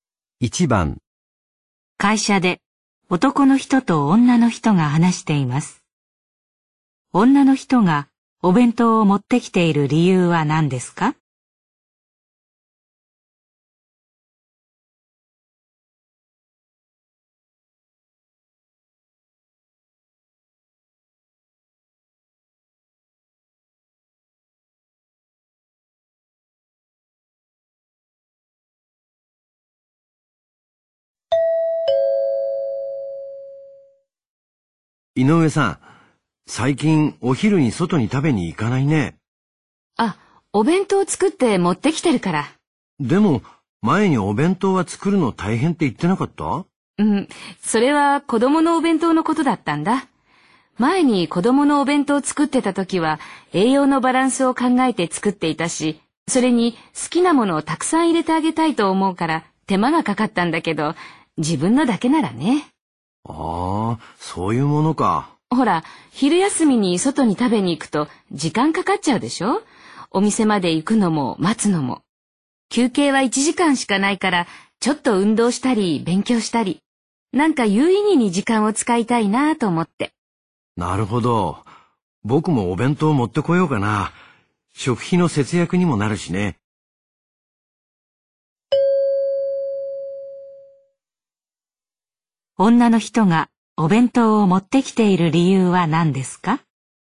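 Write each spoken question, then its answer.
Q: 女の人がお弁当を持ってきている理由は何ですか?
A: 昼休みの時間を有意義に使いたいから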